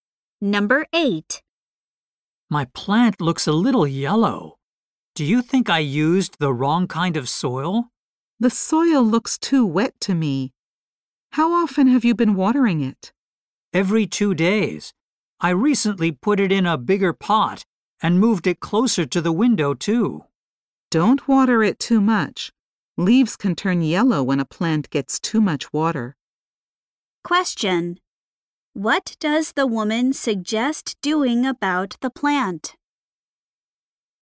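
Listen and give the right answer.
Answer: Watering it less.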